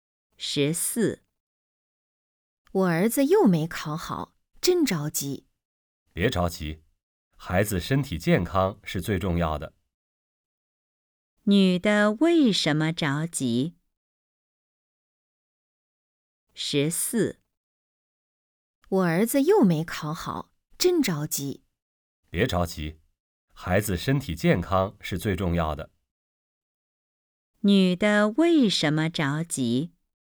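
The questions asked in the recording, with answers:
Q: 女的为什么着急?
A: 儿子又没考好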